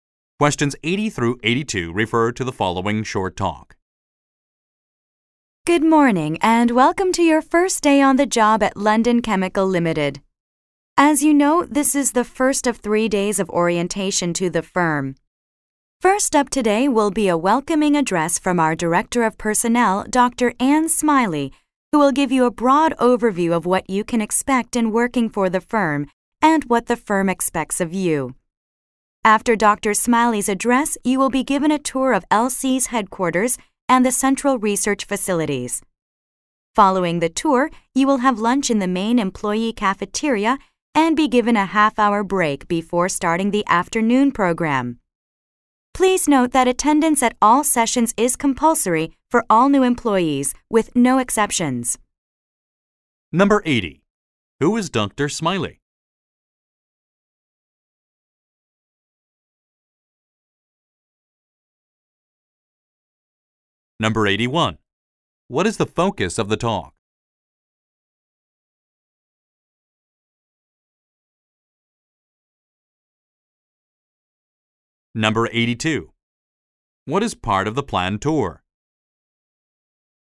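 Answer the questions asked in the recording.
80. The Director of Personnel
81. The orientation schedule for new employees
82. The headquarters and the central research facilities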